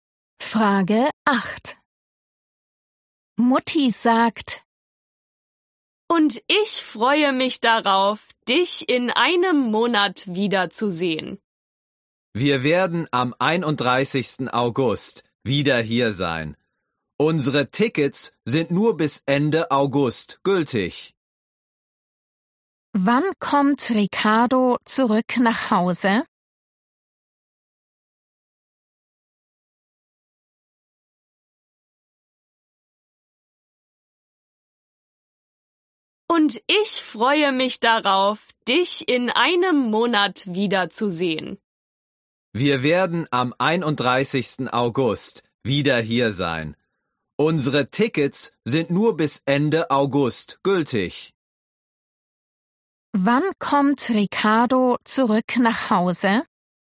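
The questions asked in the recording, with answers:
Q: Wann kommt Ricardo zurück nach Hause?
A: am 31. August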